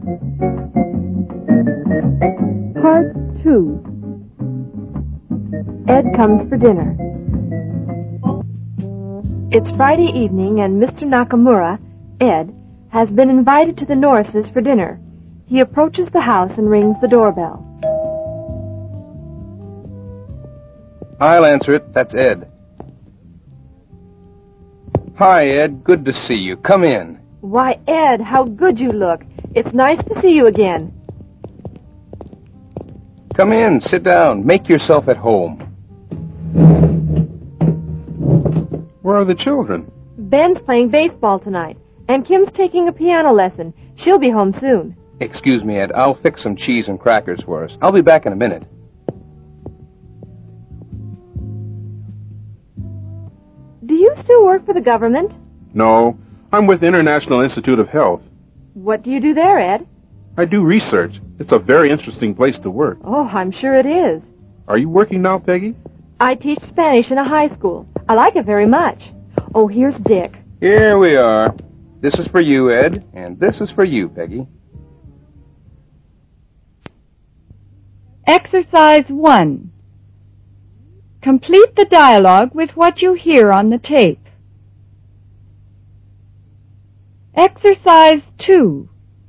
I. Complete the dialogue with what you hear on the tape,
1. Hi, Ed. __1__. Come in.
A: Good to see you.

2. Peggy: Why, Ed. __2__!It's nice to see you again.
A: How good you look

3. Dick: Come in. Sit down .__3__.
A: Make yourself at home

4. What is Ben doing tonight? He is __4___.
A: playing baseball

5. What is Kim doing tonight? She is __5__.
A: taking a piano lesson

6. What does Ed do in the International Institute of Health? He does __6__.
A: research

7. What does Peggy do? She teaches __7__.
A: Spanish

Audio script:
II.Ed Comes For Dinner (1'10〃)
It's Friday evening and Mr. Nakamura (Ed) has been invited to the Norrises' for dinner. He approaches the house and rings the doorbell.
(doorbell rings)
Dick: I'll answer it. That's Ed.
Hi, Ed. Good to see you. Come in.
Peggy: Why, Ed. How good you look! It's nice to see you again.
Dick: Come in. Sit down. Make yourself at home.
Ed: Where are the children?
Peggy: Ben's playing baseball tonight. And Kim's taking a piano lesson. She'll be home soon.
Dick: Excuse me, Ed. I'll fix some cheese and crackers for us. I'll be back in a minute.
Peggy: Do you still work for the government?
Ed: No. I'm with the International Institute of Health.
Peggy: What do you do there, Ed?
Ed: I do research. It's a very interesting place to work.
Peggy: Oh, I'm sure it is.
Ed: Are you working now, Peggy?
Peggy: I teach Spanish in a high school. I like it very much ... Oh, here's Dick.
Dick: Here we are. This is for you, Ed. And this is for you, Peggy.
III. Old Friends Meet (1'35〃)
Michael was walking along the street the other day. Suddenly he heard somebody shouting his name. He stopped and looked round.